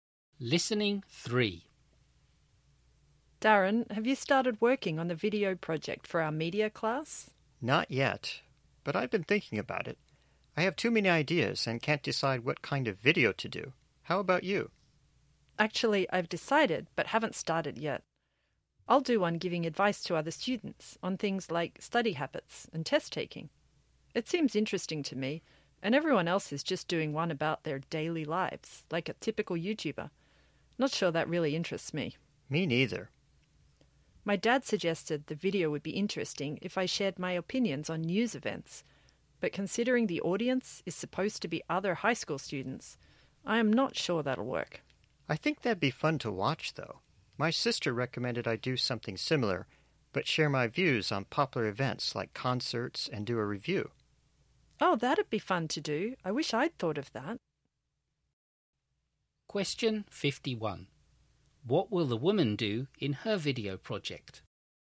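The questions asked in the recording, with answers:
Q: What will the woman do in her video project?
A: Give other students advice on things like study habits and test taking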